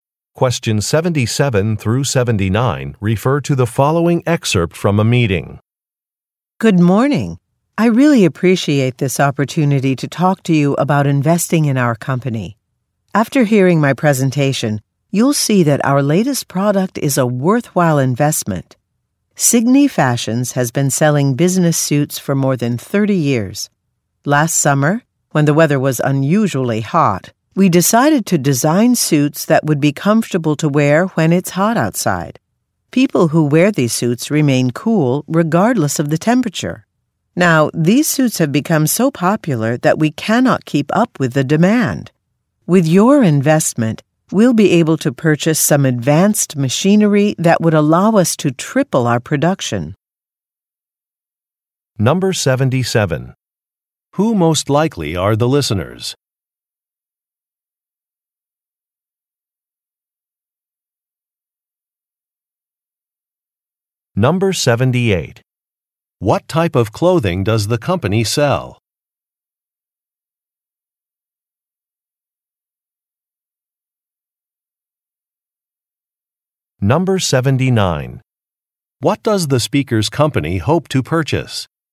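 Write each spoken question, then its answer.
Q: Who most likely are the listeners?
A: Potential investors

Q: What type of clothing does the company sell?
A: Business suits

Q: What does the speaker's company hope to purchase?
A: Advanced machinery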